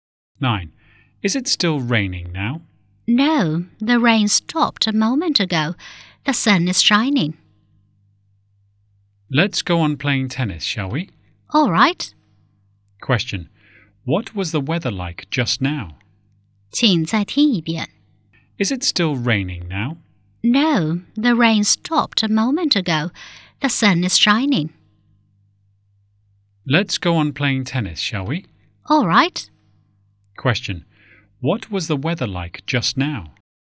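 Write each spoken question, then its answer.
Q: Question. What was the weather like just now?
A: Rainy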